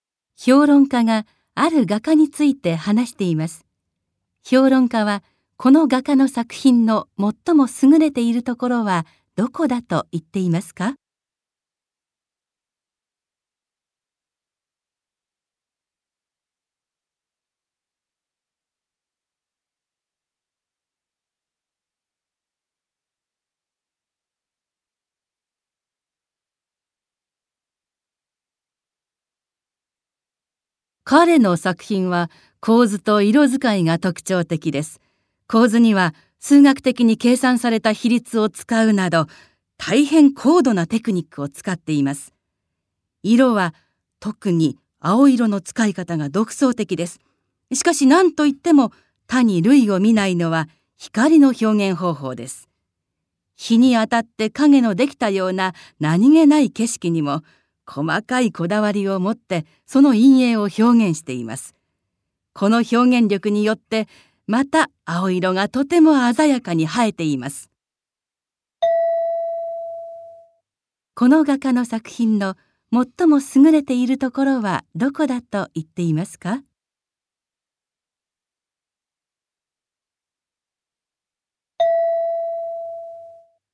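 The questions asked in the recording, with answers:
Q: この画家の作品の最も優れているところはどこだと言っていますか?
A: 光の表現方法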